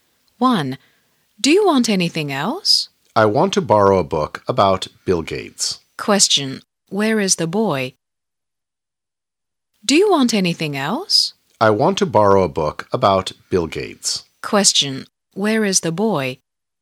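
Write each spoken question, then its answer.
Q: Where is the boy?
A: In a library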